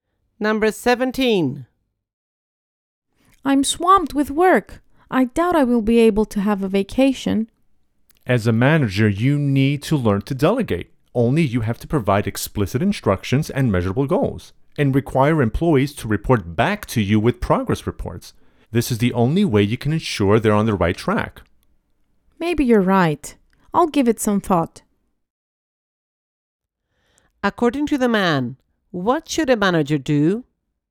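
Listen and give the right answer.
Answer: Delegate work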